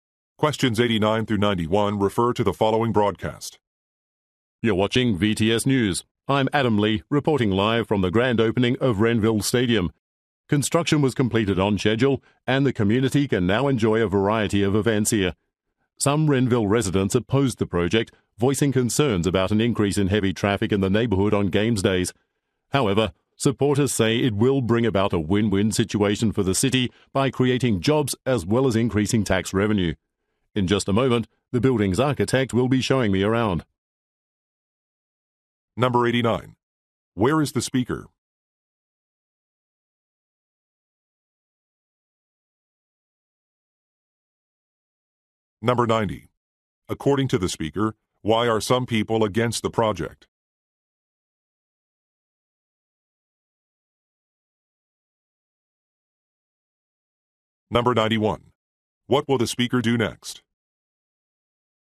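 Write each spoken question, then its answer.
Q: Where is the speaker?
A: At a new stadium

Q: According to the speaker, why are some people against the project?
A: Concerns about increased traffic

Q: What will the speaker do next?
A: Take a tour with the architect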